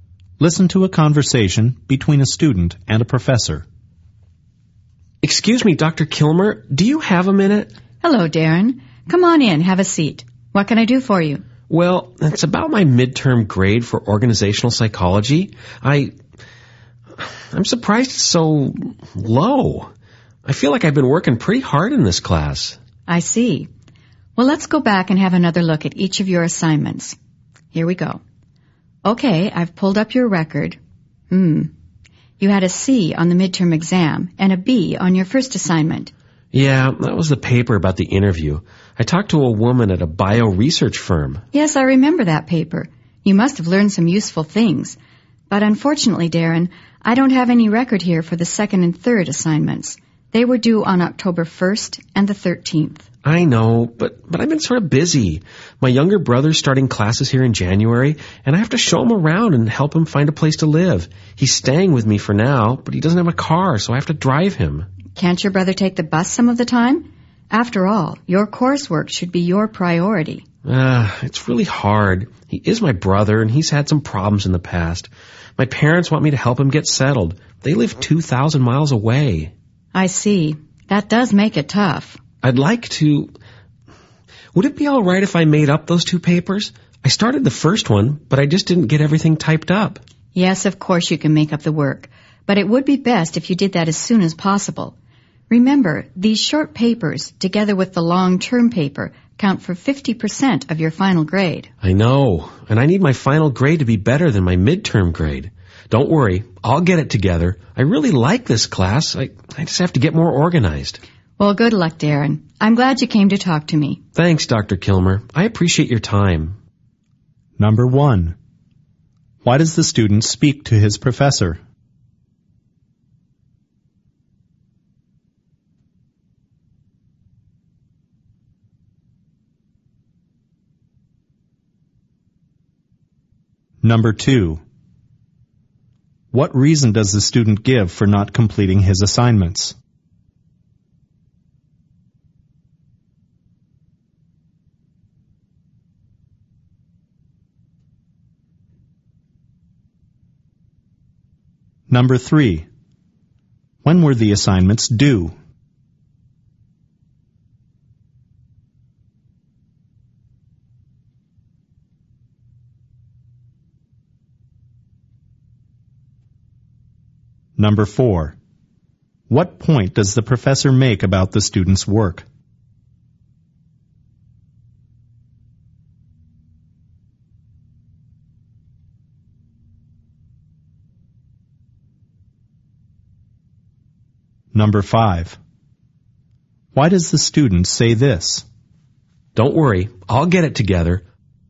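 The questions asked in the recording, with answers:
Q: Why does the student speak to his professor?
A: He is surprised his midterm grade is so low and wants to discuss it

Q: What reason does the student give for not completing his assignments?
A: He has been busy helping his younger brother get settled

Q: When were the assignments due?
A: October 1st and the 13th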